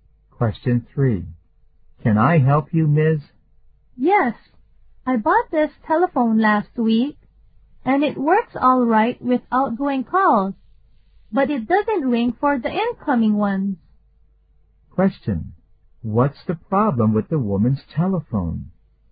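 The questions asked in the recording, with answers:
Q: What's the problem with the woman's telephone?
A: It doesn't ring for incoming calls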